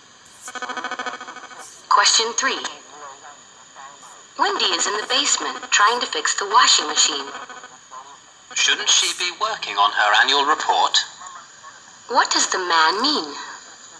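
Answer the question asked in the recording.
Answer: Wendy should be working on her annual report instead.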